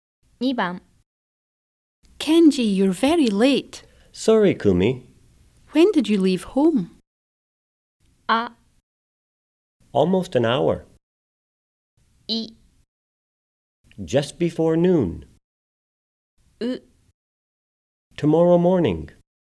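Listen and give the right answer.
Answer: い: Just before noon.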